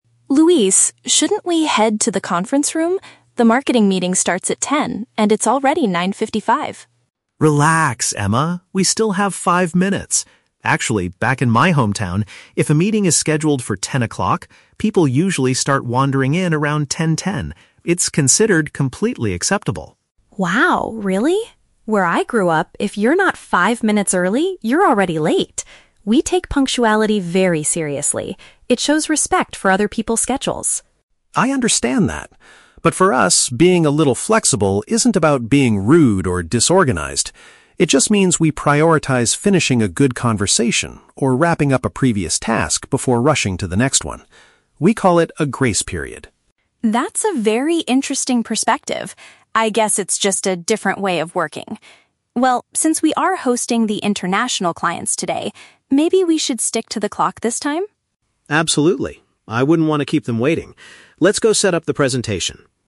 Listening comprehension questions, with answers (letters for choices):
Listen to the conversation between two colleagues. Choose the correct answer (A, B, or C) for each question.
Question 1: Why does Emma want to leave for the meeting immediately?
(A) Because she believes arriving ahead of schedule is expected.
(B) Because the meeting has already started without them.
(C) Because she needs extra time to print the presentation documents.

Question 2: How does Luis explain his culture's habit of arriving after the official start time?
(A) It is often caused by the unreliability of local public transportation.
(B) It allows them to naturally finish what they are currently doing.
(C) It shows the clients that they are extremely busy and successful.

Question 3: What do they agree to do at the end of the conversation?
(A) They decide to adopt Luis's flexible approach for the morning.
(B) They agree to cancel the meeting due to a cultural misunderstanding.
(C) They decide to be strictly on time to welcome their guests.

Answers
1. A
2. B
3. C

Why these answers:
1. Emma states that "if you're not five minutes early, you're already late," which means arriving ahead of schedule is expected in her culture. Option (B) is a trap; the time is 9:55 and the meeting is at 10:00, so it hasn't started yet. Option (C) is a plausible office task, but printing documents is never mentioned.
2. Luis explains that being late means they "prioritize finishing a good conversation or wrapping up a previous task" (finish what they are currently doing). Option (A) is a very common real-world reason for being late, but it is not what Luis says in the audio. Option (C) is also not mentioned.
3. Emma suggests they "stick to the clock" (be strictly on time) because they are hosting "international clients" (guests), and Luis agrees. Option (A) is a trap; Luis agrees to follow Emma's punctual approach this time, not his own flexible approach. Option (B) is a trap; they had a friendly discussion, not a misunderstanding that leads to cancellation.

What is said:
Emma: Luis, shouldn't we head to the conference room? The marketing meeting starts at 10:00, and it's already 9:55.
Luis: Relax, Emma! We still have five minutes. Actually, back in my hometown, if a meeting is scheduled for 10:00, people usually start wandering in around 10:10. It's considered completely acceptable.
Emma: Wow, really? Where I grew up, if you're not five minutes early, you're already late. We take punctuality very seriously. It shows respect for other people's schedules.
Luis: I understand that. But for us, being a little flexible isn't about being rude or disorganized. It just means we prioritize finishing a good conversation or wrapping up a previous task before rushing to the next one. We call it a "grace period."
Emma: That's a very interesting perspective. I guess it's just a different way of working. Well, since we are hosting the international clients today, maybe we should stick to the clock this time?